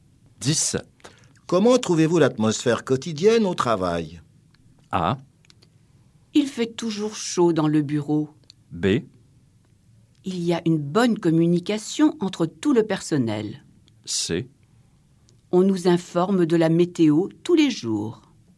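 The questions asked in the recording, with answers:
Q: Comment trouvez-vous l'atmosphère quotidienne au travail?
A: B: Il y a une bonne communication entre tout le personnel.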